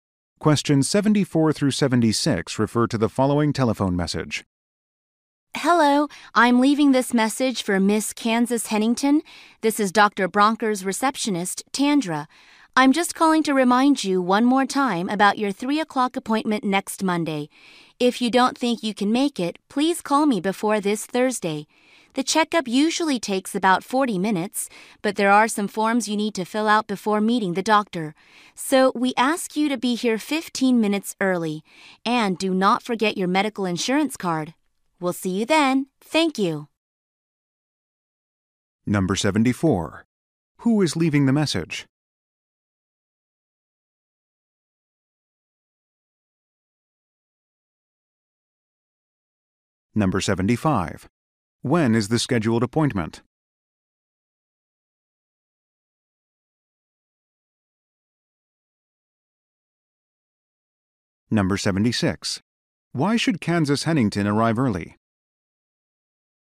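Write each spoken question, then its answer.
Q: Who is leaving the message?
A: A doctor's receptionist

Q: When is the scheduled appointment?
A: Next Monday at 3 o'clock

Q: Why should Kansas Hennington arrive early?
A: To fill out some forms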